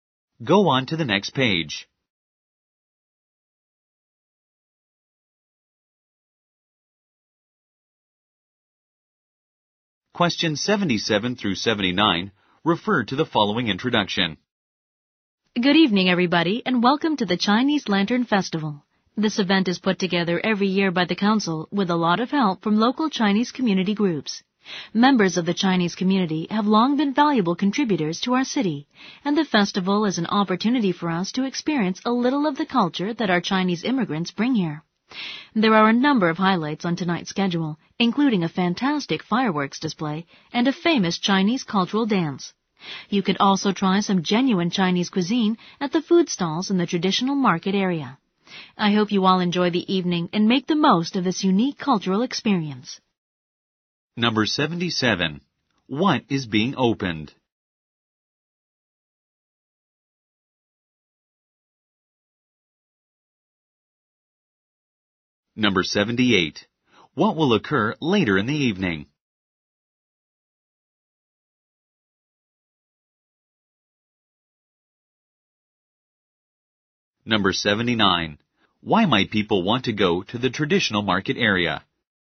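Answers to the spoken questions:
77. The Chinese Lantern Festival
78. A fireworks display and a Chinese cultural dance
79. To try genuine Chinese food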